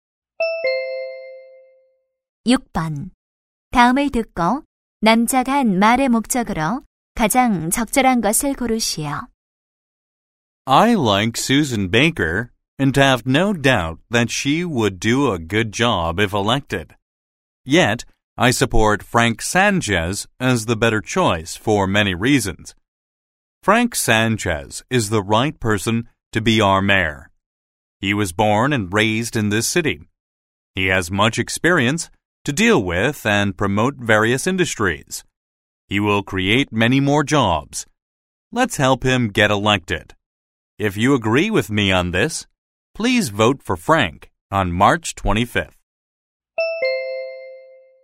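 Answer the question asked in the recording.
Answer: Frank Sanchez 시장 후보 지지 호소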